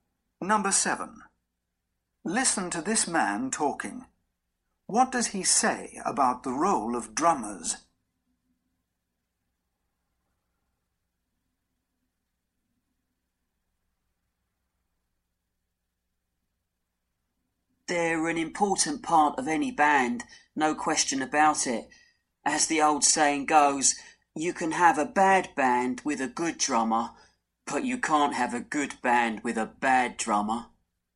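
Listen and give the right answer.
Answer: They are an important part of any band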